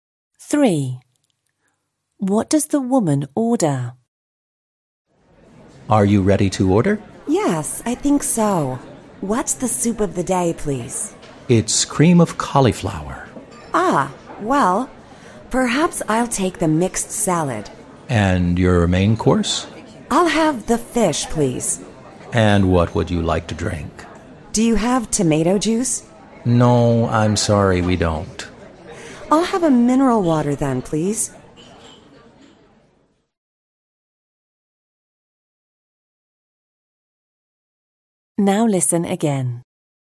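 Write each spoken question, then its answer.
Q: What does the woman order?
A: Mixed salad, fish and mineral water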